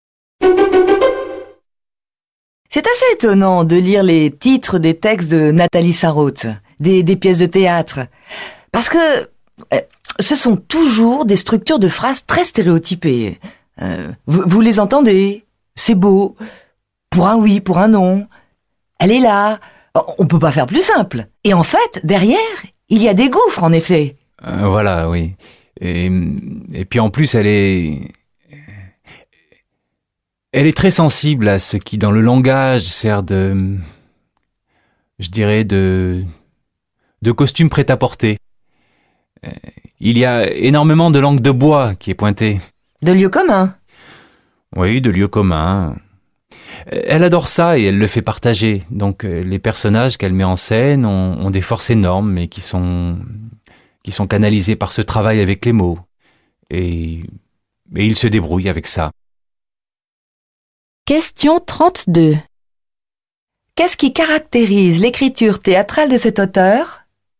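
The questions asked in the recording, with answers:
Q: Qu'est-ce qui caractérise l'écriture théâtrale de cet auteur?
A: Un langage simple et stéréotypé, des lieux communs cachant des gouffres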